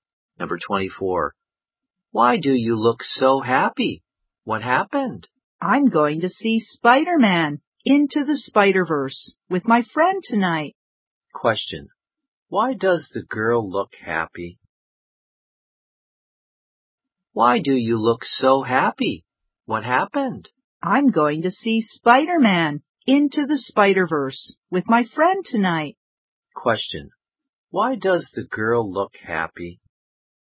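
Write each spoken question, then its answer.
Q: Why does the girl look happy?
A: She is going to see Spider-Man: Into the Spider-Verse with her friend tonight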